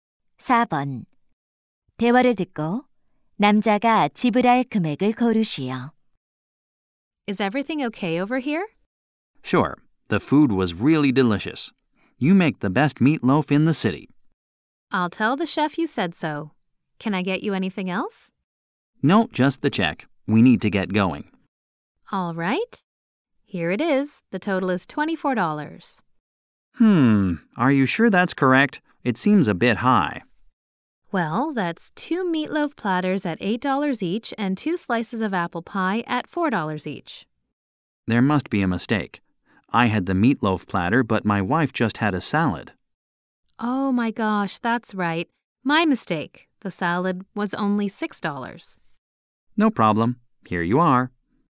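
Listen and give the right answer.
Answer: $22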